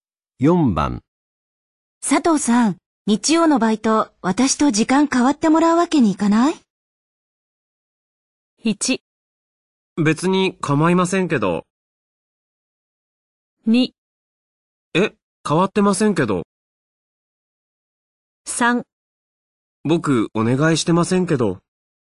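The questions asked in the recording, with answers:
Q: 佐藤さん、日曜のバイト、私と時間変わってもらうわけにいかない?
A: 1: 別に構いませんけど。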